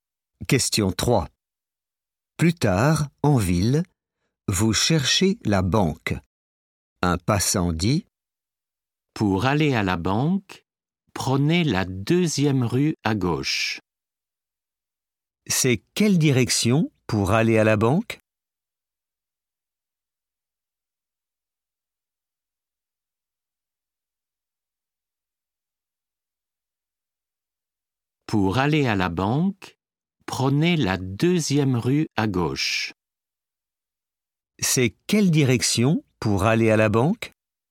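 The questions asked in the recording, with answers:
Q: C'est quelle direction pour aller à la banque ?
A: la deuxième rue à gauche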